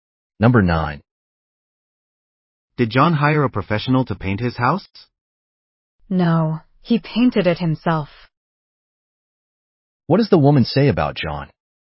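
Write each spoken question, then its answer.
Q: What does the woman say about John?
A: He painted his house himself.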